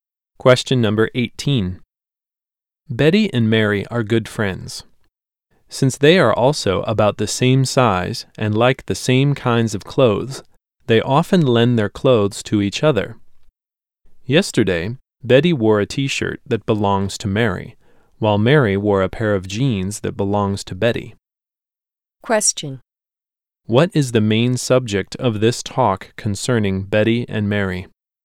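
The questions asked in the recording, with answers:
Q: What is the main subject of this talk concerning Betty and Mary?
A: They lend each other clothes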